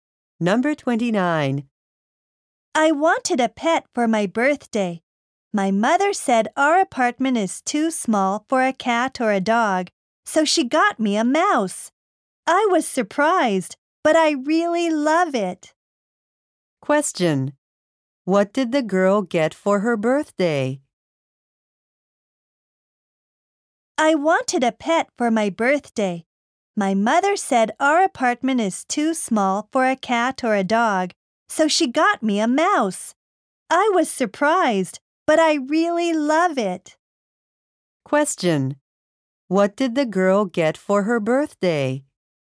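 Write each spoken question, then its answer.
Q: What did the girl get for her birthday?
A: A mouse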